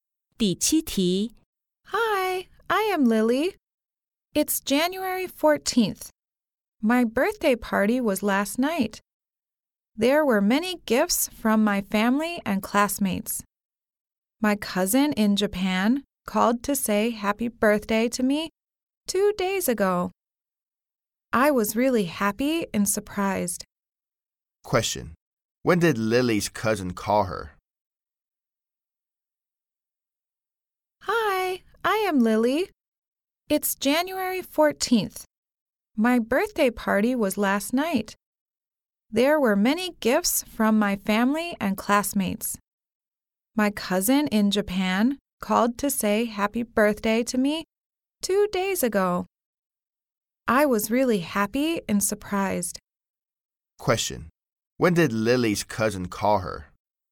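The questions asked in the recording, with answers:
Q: When did Lily's cousin call her?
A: January 12th (2 days ago)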